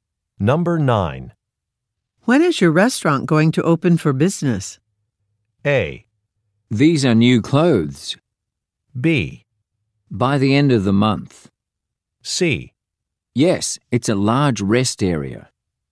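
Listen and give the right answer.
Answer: B: By the end of the month.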